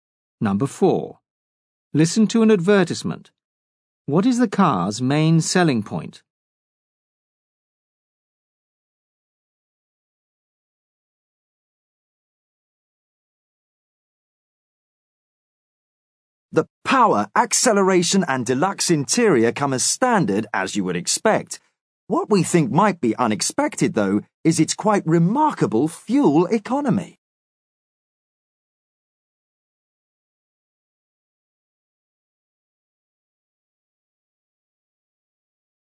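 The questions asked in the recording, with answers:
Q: What is the car's main selling point?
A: Its remarkable fuel economy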